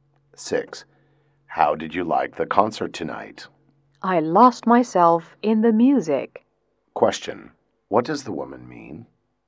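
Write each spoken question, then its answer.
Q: What does the woman mean?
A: She enjoyed the concert very much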